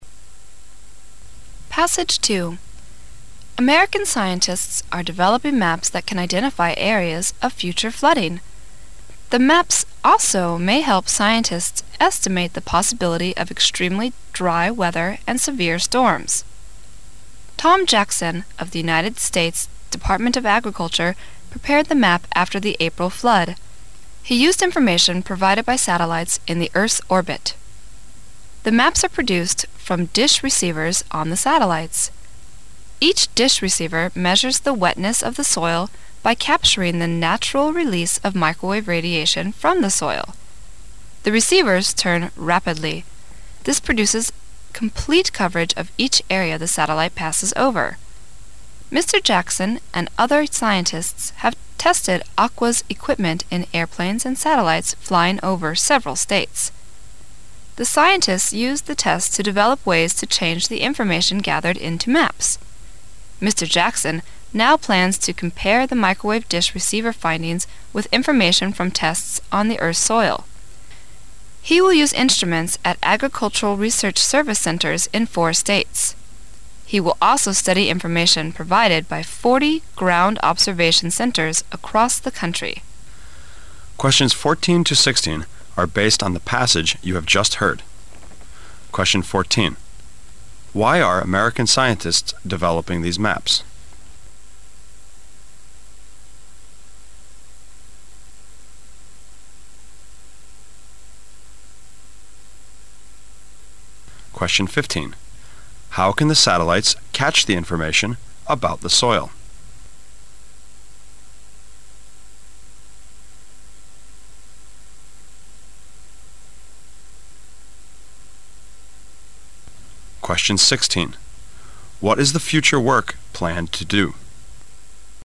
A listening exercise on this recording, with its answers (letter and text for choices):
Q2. How can the satellites catch the information about the soil?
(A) By turning the intensity of sunshine into maps.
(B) By analyzing the recent weather report.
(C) By capturing the microwave radiation from the soil.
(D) By analyzing information provided by ground observation centers.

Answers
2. (C) By capturing the microwave radiation from the soil.

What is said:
[解析] 14-16 American scientists are developing maps that can identify areas of future flooding. The maps also may help scientists estimate the possibility of extremely dry weather and severe storms. Tom Jackson of the United States Department of Agriculture prepared the map after the April flood. He used information provided by satellites in the Earth orbit. The maps are produced from dish receivers on the satellites. Each dish receiver measures the wetness of the soil by capturing the natural release of microwave radiation from the soil. The receivers mm rapidly. This produces complete coverage of each area the satellite passes over. Mr. Jackson and other scientists have tested Aqua's equipment in airplanes and satellites flying over several states. The scientists used the tests to develop ways to change the information gathered into maps. Mr. Jackson now plans to compare the microwave dish receiver findings with information from tests on the Earth's soil. He will use instruments at Agricultural Research Service centers in four states. He will also study information provided by forty ground observation centers across the country. Why are American scientists developing these maps?